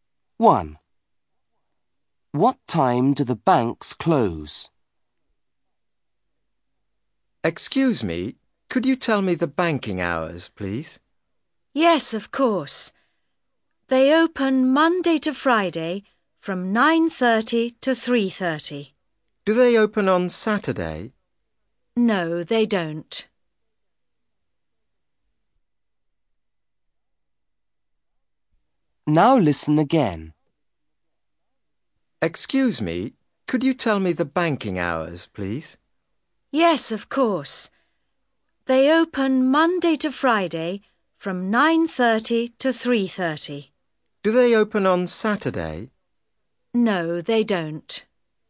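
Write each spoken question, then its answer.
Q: What time do the banks close?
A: 3:30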